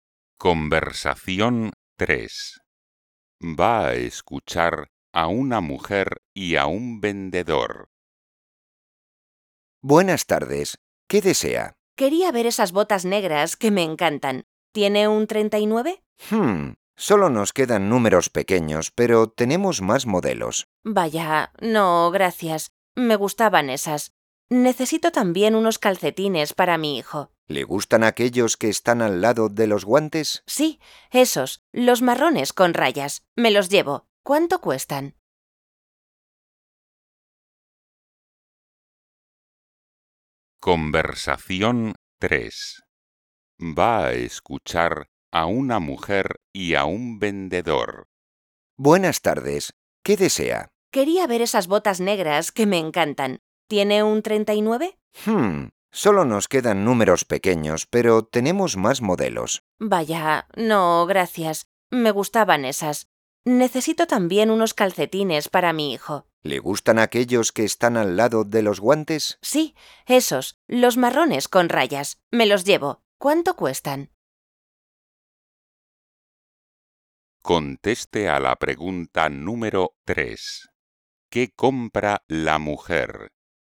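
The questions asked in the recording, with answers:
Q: ¿Qué compra la mujer?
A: unos calcetines marrones con rayas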